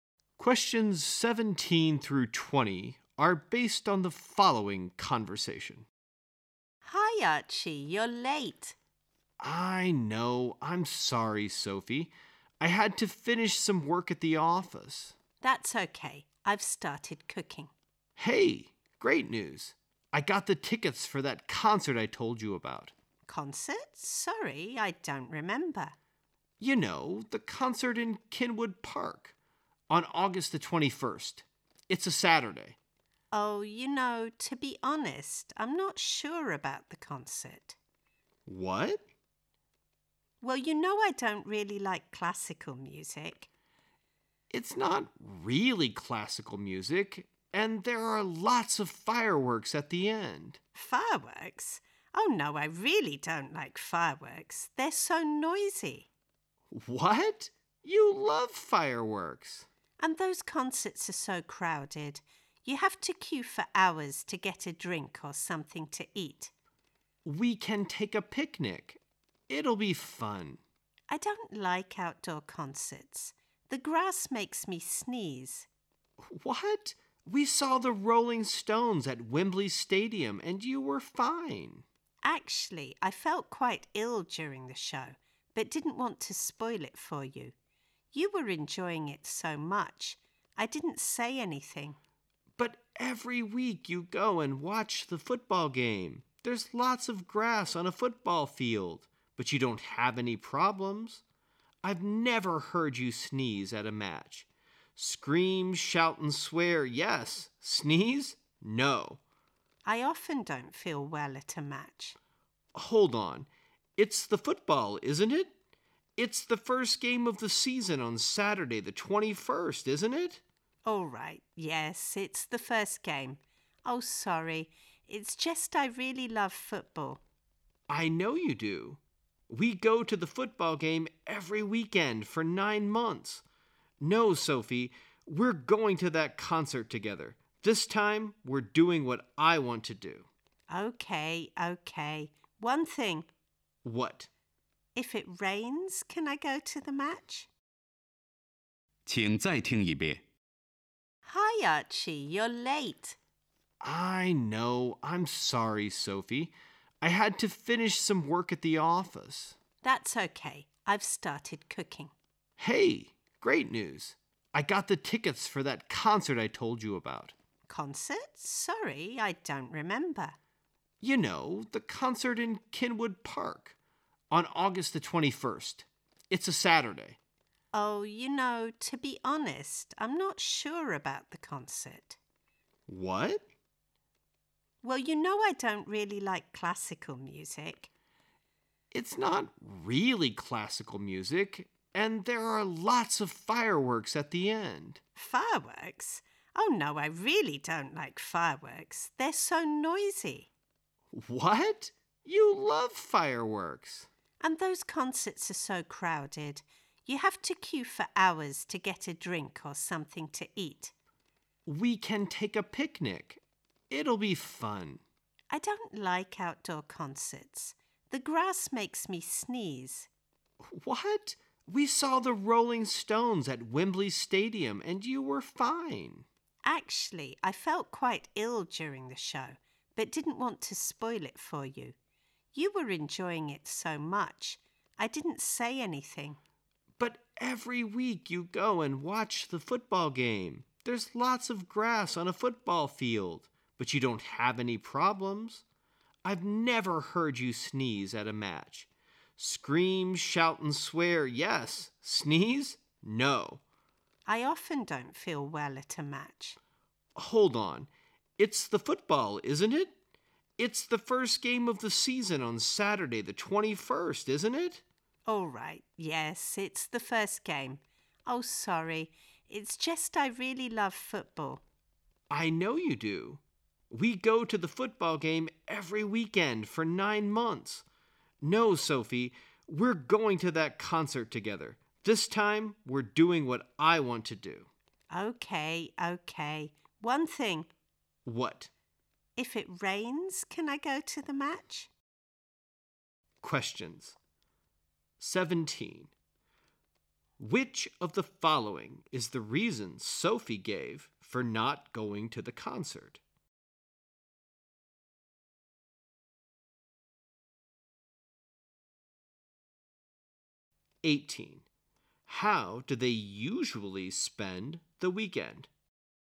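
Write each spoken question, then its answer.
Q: How do they usually spend the weekend?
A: Going to football games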